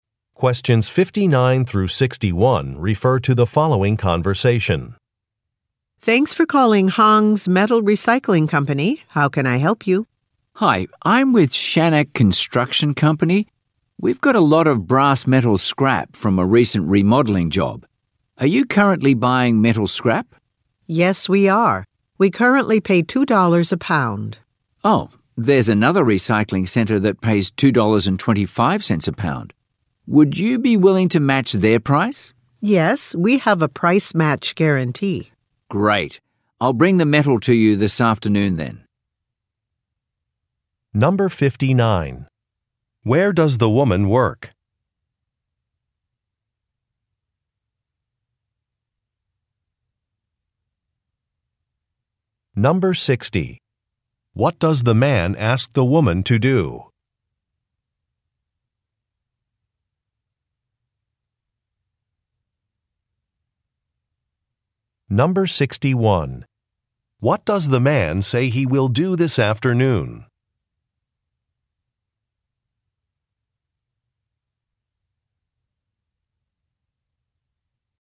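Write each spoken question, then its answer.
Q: Where does the woman work?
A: At Hong's Metal Recycling Company

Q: What does the man ask the woman to do?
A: Match another recycling center's price

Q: What does the man say he will do this afternoon?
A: Bring the metal to the recycling company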